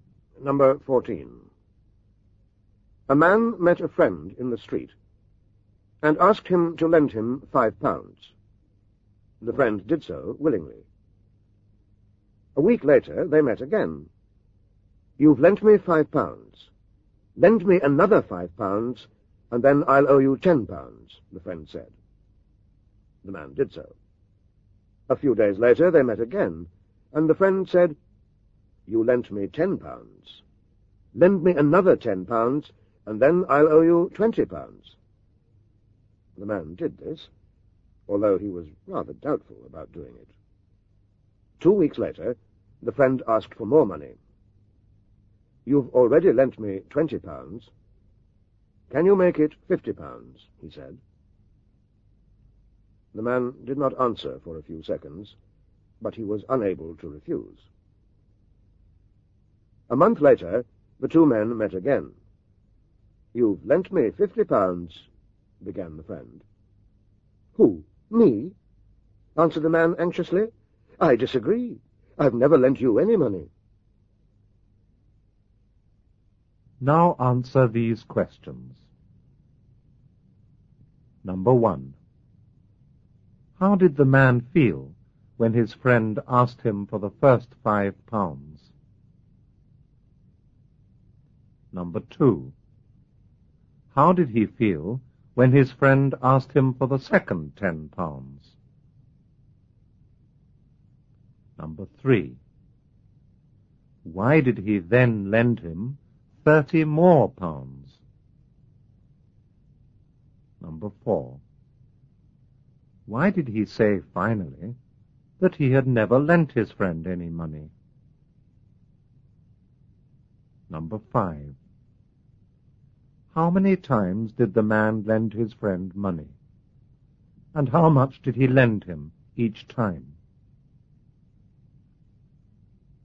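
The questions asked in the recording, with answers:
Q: How did he feel when his friend asked him for the second £10?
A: He was rather doubtful.

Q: Why did he then lend him 30 more pounds?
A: Because he was unable to refuse.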